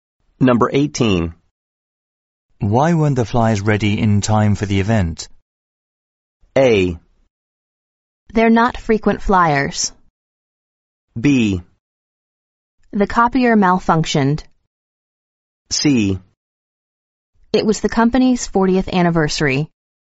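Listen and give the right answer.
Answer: B: The copier malfunctioned.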